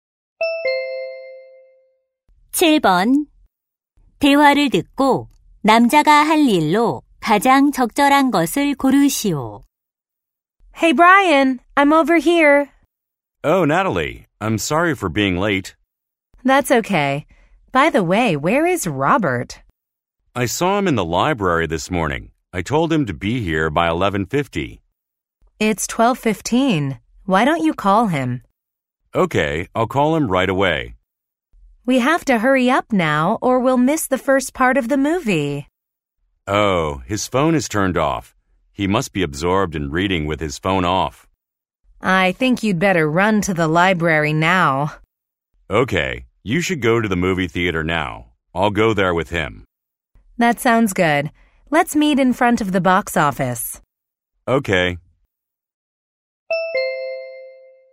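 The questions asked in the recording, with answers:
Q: 대화를 듣고 남자가 할 일로 가장 적절한 것을 고르시오.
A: 도서관에 가서 Robert를 데려오기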